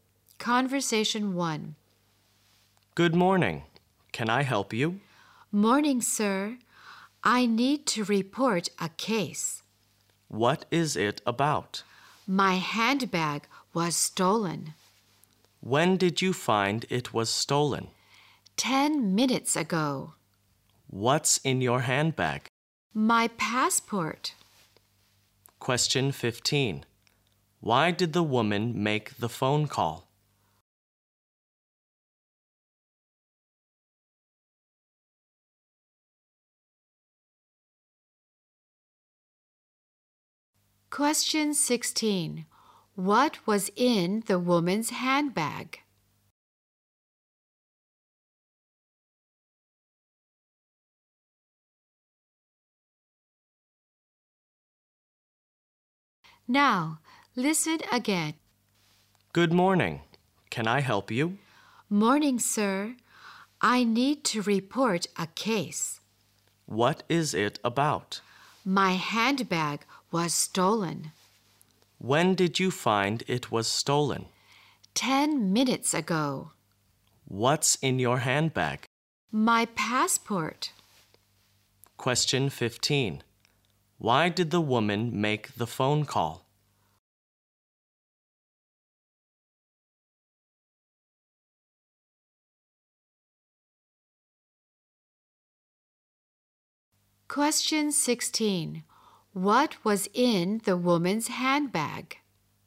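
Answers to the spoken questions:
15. To report that her handbag was stolen
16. Her passport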